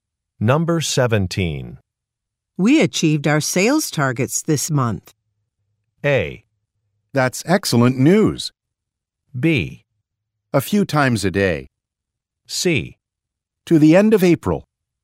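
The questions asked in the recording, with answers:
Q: We achieved our sales targets this month.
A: A: That's excellent news.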